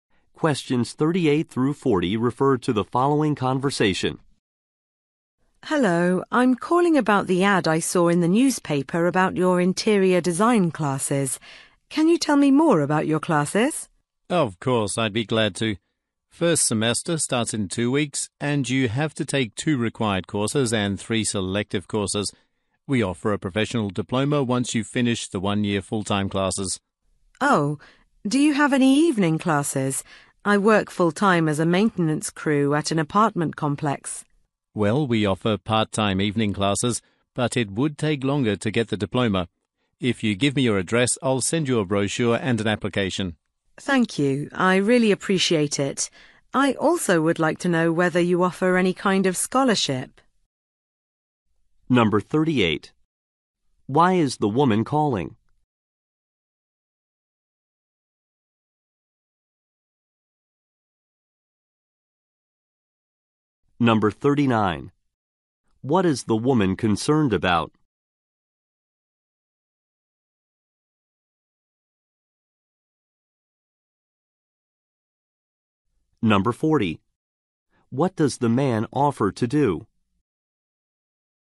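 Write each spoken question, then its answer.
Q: Why is the woman calling?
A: To ask about interior design classes

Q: What does the man offer to do?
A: Send a brochure and an application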